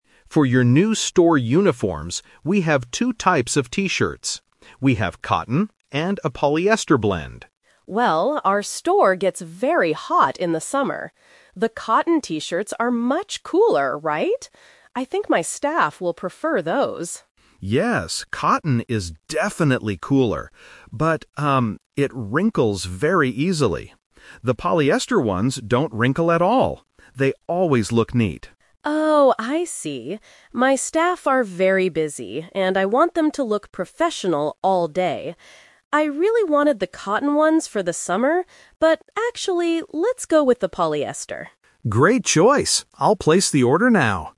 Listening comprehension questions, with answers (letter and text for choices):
Listen to the conversation and choose the correct answer (A, B, or C).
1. Why does the manager like the cotton t-shirts at first?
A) They do not wrinkle.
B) They are much cooler.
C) They are cheaper.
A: B) They are much cooler.

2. What is the problem with the cotton t-shirts?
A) They wrinkle easily.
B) They are too hot for the summer.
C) They are difficult to wash.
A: A) They wrinkle easily.

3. Which t-shirts does the manager decide to order?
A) The cotton t-shirts, because the store is hot.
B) The polyester t-shirts, because they always look neat.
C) She decides to order both types of t-shirts.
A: B) The polyester t-shirts, because they always look neat.

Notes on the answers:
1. The manager says, "The cotton t-shirts are much cooler, right?" Option A is a trap because not wrinkling is a feature of the polyester shirts. Option C is a plausible reason to like a product, but the price is never mentioned in the audio.
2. The supplier warns the manager that the cotton fabric "wrinkles very easily." Option B is a trap because the audio actually says the cotton shirts are cooler, not hotter. Option C is a plausible guess for uniforms but is not mentioned.
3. This question uses the "Twist" technique. The manager initially wants the cotton shirts because the store is hot, but she changes her mind when she learns they wrinkle. She chooses the polyester ones so her staff will look professional and neat. Option A is the main trap (her original plan). Option C is incorrect.

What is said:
Supplier: For your new store uniforms, we have two types of T-shirts. We have cotton and a polyester blend.
Manager: Well, our store gets very hot in the summer. The cotton T-shirts are much cooler, right? I think my staff will prefer those.
Supplier: Yes, cotton is definitely cooler. But, um, it wrinkles very easily. The polyester ones don't wrinkle at all. They always look neat.
Manager: Oh, I see. My staff are very busy, and I want them to look professional all day. I really wanted the cotton ones for the summer, but actually, let's go with the polyester.